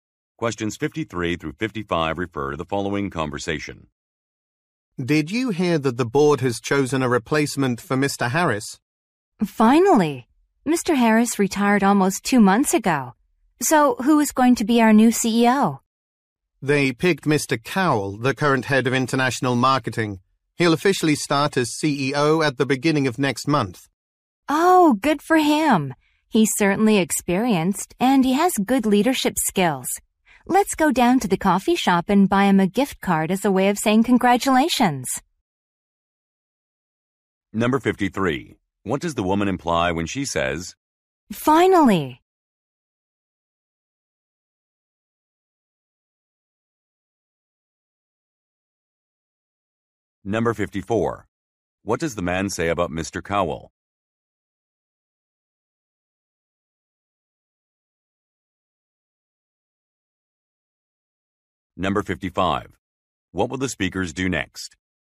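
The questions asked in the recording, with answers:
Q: What does the woman imply when she says,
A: The decision took a long time

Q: What will the speakers do next?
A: Go buy Mr. Cowell a gift card at the coffee shop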